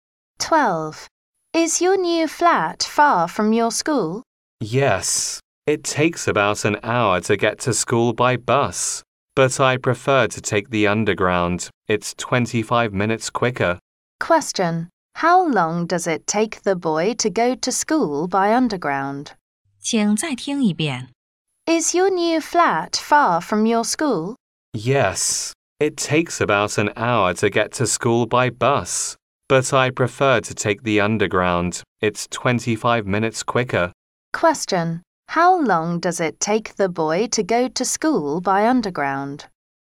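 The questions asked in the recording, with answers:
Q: How long does it take the boy to go to school by underground?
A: About 35 minutes.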